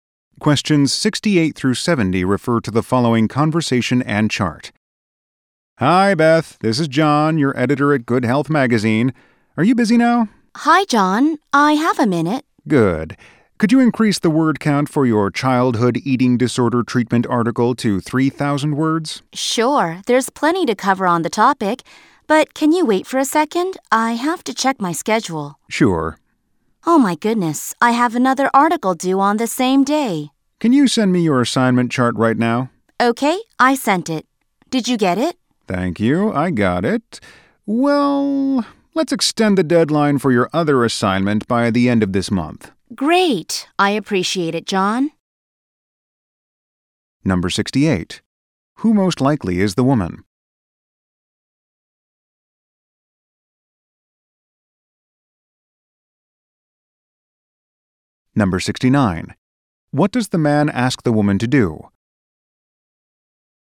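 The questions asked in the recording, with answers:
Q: Who most likely is the woman?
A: A writer for a magazine

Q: What does the man ask the woman to do?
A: Increase the word count of her article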